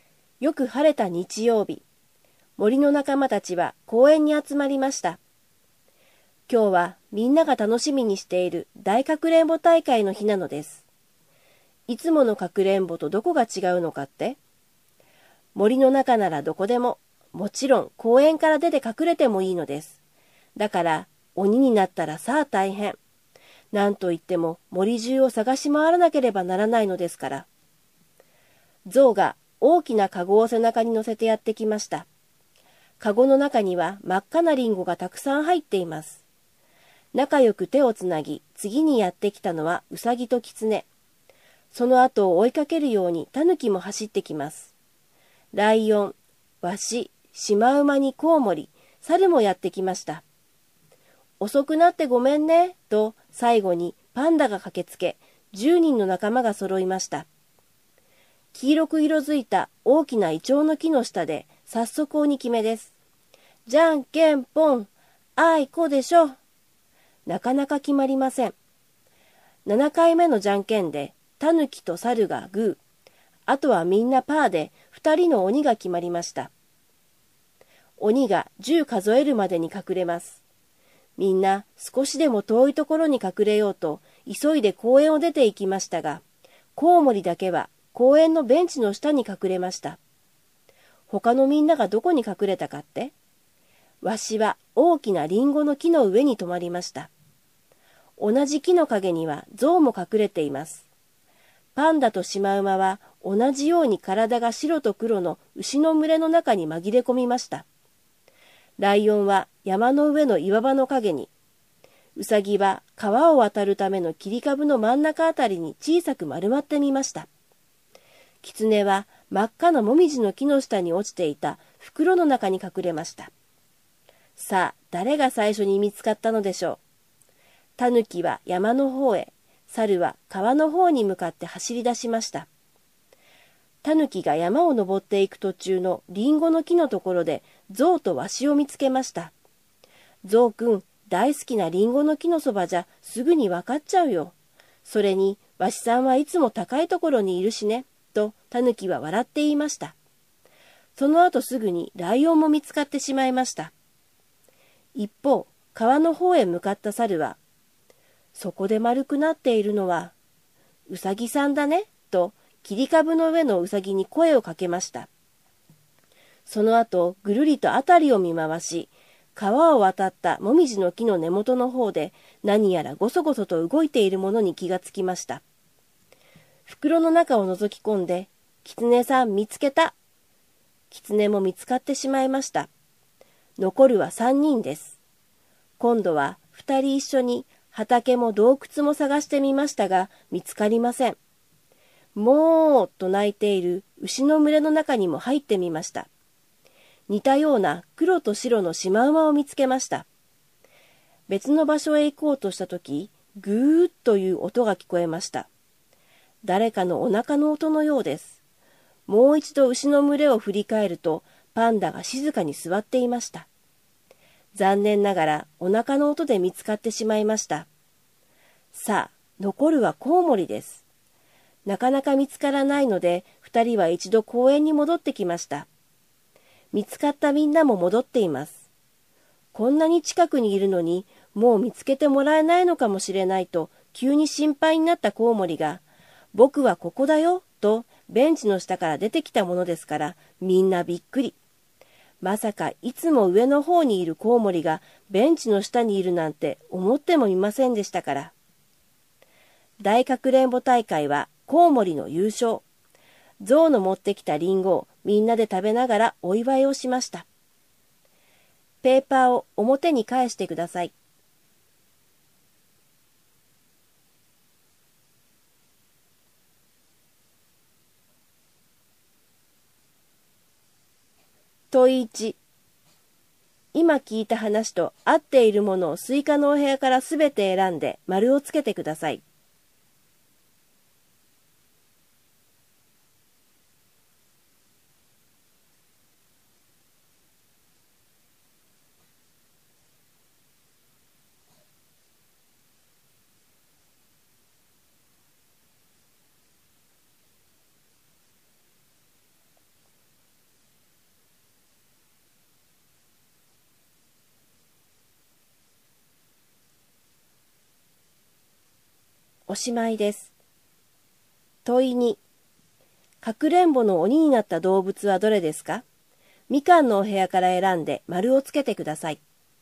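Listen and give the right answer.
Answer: タヌキとサル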